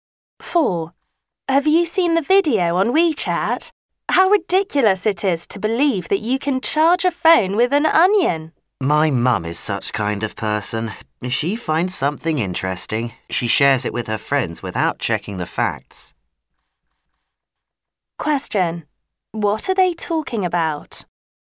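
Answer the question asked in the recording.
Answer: People sharing online information without checking the facts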